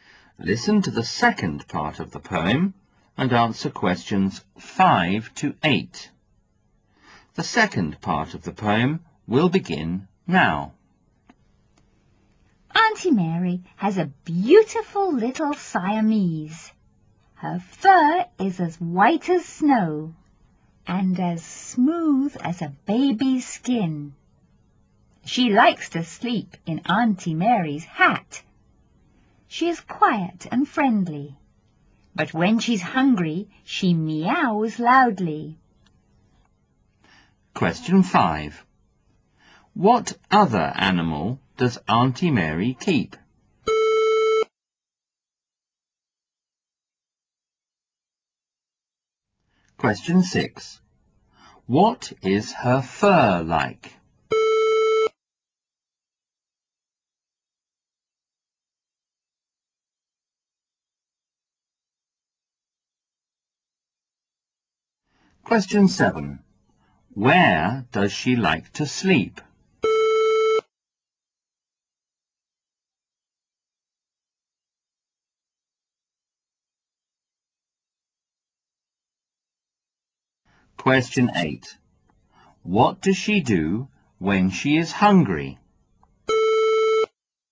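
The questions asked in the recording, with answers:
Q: What other animal does Auntie Mary keep?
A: A Siamese cat

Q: What is her fur like?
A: White as snow and smooth as a baby's skin

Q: Where does she like to sleep?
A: In Auntie Mary's hat

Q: What does she do when she is hungry?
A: She meows loudly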